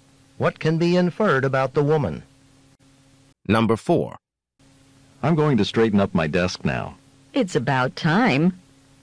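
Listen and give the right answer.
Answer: The man should have cleaned his desk long ago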